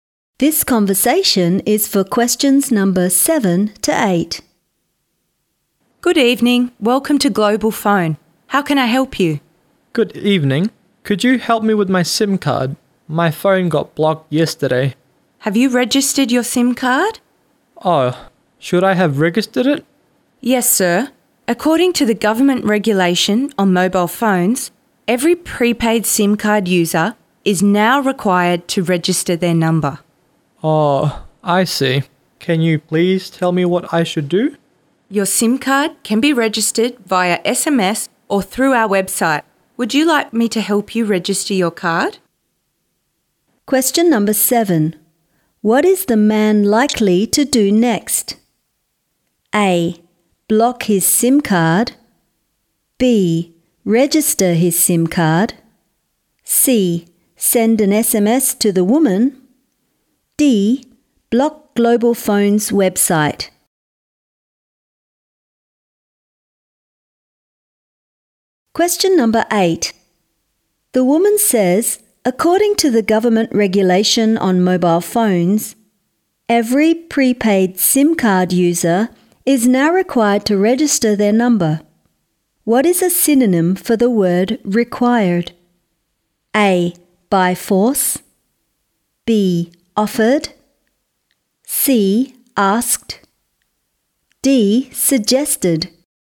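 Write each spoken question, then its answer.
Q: What is the man likely to do next?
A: B: Register his SIM card.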